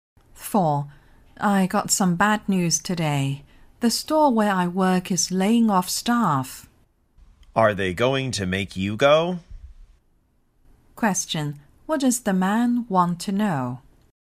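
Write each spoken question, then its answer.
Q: What does the man want to know?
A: Whether the woman will lose her job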